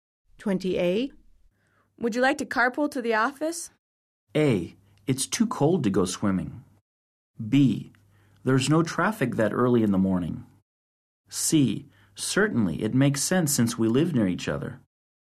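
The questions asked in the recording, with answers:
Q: Would you like to carpool to the office?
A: C: Certainly, it makes sense since we live near each other.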